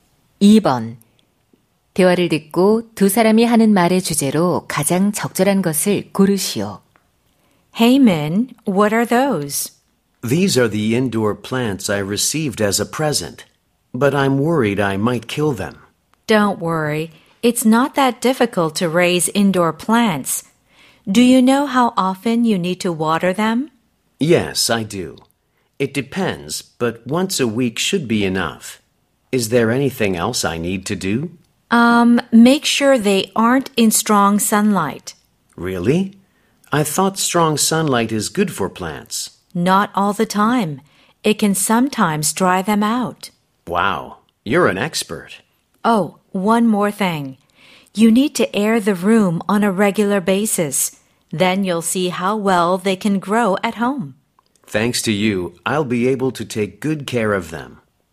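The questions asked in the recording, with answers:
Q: 대화를 듣고 두 사람이 하는 말의 주제로 가장 적절한 것을 고르시오.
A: 실내 식물 기르는 방법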